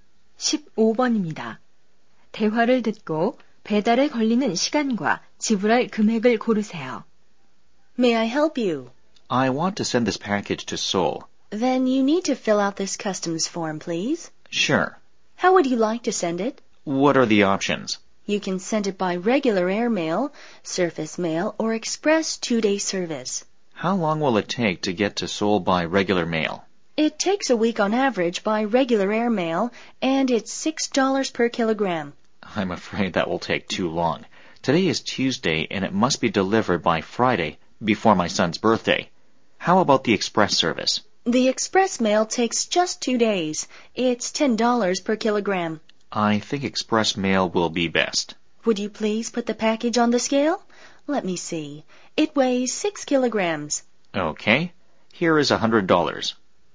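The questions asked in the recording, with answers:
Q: 대화를 듣고 배달에 걸리는 시간과 지불할 금액을 고르세요.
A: 2일, 60달러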